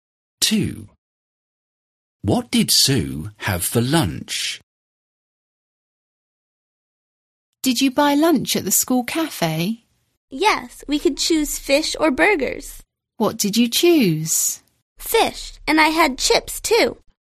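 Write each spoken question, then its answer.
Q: What did Sue have for lunch?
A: fish and chips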